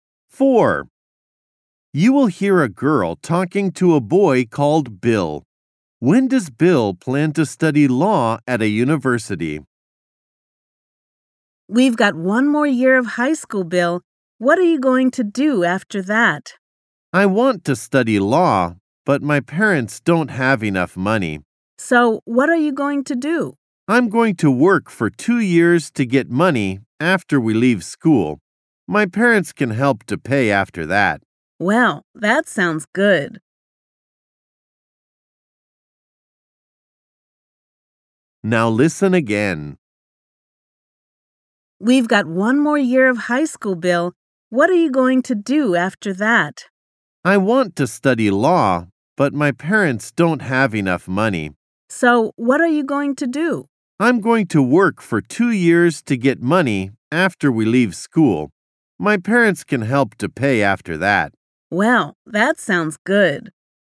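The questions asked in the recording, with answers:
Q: When does Bill plan to study law at a university?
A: After working for 2 years after high school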